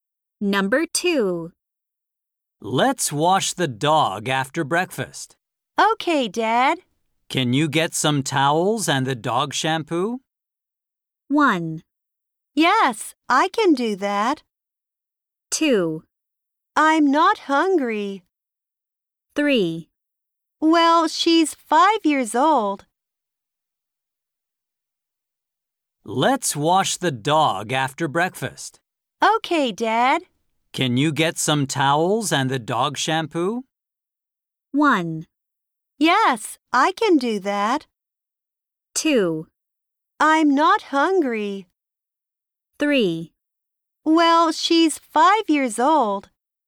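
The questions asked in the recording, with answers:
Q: Can you get some towels and the dog shampoo?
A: 1: Yes, I can do that.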